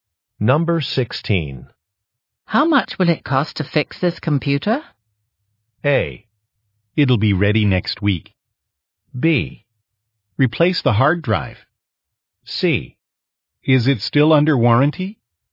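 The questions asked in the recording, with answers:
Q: How much will it cost to fix this computer?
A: C: Is it still under warranty?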